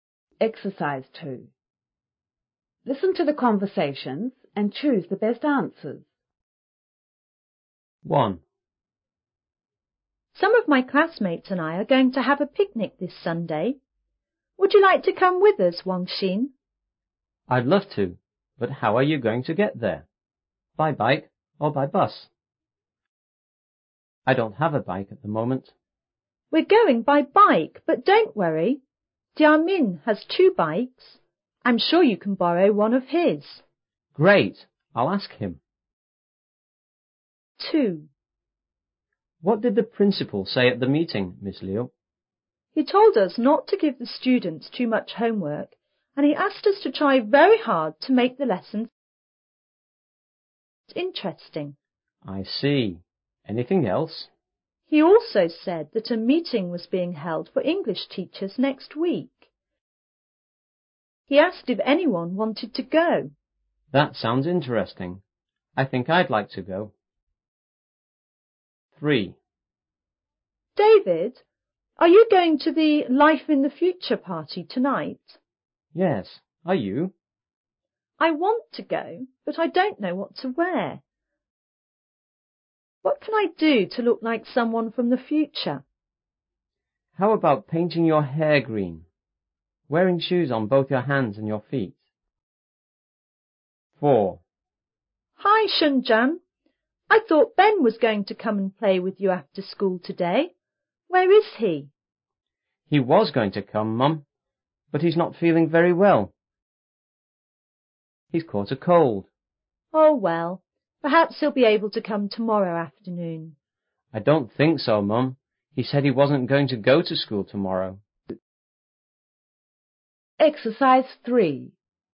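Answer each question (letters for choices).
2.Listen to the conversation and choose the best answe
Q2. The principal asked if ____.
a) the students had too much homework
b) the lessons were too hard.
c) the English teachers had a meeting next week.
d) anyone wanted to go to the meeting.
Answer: d

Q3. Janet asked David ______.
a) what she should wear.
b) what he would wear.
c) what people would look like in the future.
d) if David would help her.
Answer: a

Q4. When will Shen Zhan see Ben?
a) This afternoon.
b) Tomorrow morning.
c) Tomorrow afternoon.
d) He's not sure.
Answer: d

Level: 5B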